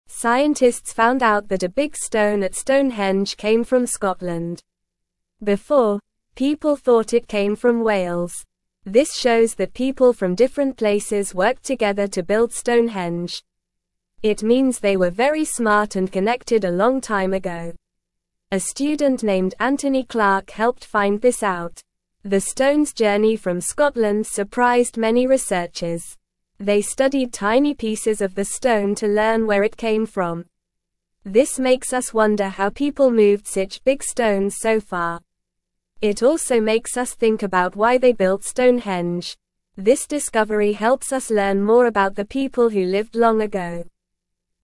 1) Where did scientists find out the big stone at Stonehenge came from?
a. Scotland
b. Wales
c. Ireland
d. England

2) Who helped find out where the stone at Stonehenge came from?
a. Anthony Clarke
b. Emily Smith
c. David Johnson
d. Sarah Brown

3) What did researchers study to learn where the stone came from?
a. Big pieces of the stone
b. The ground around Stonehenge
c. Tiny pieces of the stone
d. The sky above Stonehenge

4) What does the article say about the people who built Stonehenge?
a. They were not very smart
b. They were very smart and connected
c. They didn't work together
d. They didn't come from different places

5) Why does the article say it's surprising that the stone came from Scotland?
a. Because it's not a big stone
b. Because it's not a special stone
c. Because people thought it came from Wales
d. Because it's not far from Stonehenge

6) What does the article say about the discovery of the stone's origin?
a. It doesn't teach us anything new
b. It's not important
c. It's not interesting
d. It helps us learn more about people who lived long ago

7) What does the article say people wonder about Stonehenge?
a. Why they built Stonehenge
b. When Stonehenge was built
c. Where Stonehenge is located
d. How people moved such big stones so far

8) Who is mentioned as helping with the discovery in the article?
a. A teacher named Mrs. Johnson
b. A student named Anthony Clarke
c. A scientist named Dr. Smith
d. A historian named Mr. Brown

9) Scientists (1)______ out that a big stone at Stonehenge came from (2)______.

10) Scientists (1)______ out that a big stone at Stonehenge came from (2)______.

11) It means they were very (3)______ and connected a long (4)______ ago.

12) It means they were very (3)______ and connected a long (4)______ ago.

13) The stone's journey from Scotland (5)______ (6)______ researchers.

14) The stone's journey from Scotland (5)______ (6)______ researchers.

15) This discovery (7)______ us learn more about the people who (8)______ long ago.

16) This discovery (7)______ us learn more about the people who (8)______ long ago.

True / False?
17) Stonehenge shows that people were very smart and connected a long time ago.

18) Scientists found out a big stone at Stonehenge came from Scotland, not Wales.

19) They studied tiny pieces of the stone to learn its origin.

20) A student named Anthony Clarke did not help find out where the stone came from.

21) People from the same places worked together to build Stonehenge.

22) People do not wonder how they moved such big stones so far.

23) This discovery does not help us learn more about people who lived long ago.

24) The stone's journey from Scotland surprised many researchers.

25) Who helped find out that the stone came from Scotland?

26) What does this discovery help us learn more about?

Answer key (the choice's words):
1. Scotland
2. Anthony Clarke
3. Tiny pieces of the stone
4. They were very smart and connected
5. Because people thought it came from Wales
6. It helps us learn more about people who lived long ago
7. How people moved such big stones so far
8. A student named Anthony Clarke
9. found
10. Scotland
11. smart
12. time
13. surprised
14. many
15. helps
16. lived
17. True
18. True
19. True
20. False
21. False
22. False
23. False
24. True
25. A student named Anthony Clarke
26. The people who lived long ago

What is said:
Scientists found out that a big stone at Stonehenge came from Scotland. Before, people thought it came from Wales. This shows that people from different places worked together to build Stonehenge. It means they were very smart and connected a long time ago. A student named Anthony Clarke helped find this out.
They studied tiny pieces of the stone to learn where it came from. This makes us wonder how people moved such big stones so far. It also makes us think about why they built Stonehenge. This discovery helps us learn more about the people who lived long ago.

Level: Level 1